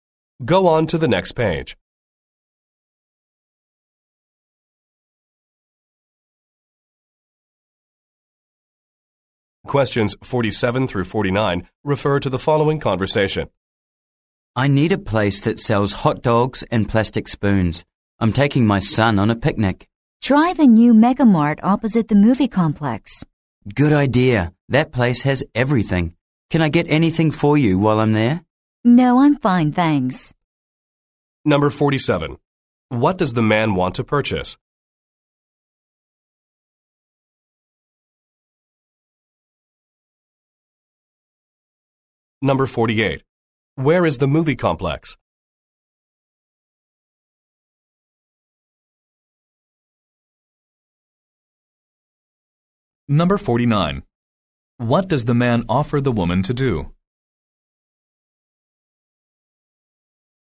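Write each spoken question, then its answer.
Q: What does the man want to purchase?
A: Hot dogs and plastic spoons

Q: Where is the movie complex?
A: Opposite the new Mega Mart

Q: What does the man offer the woman to do?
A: Get something for her at the store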